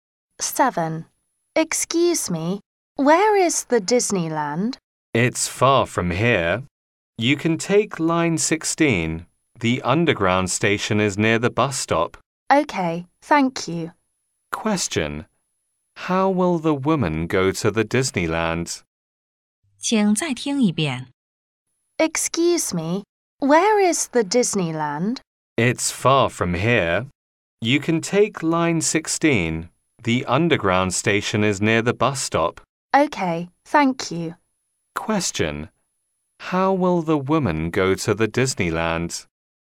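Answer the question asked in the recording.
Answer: By underground (line 16)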